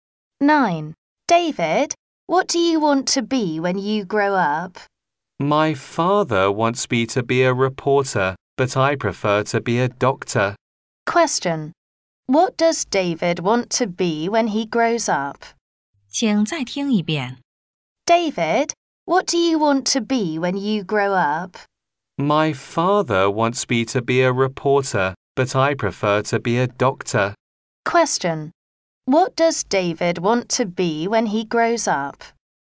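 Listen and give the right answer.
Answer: A doctor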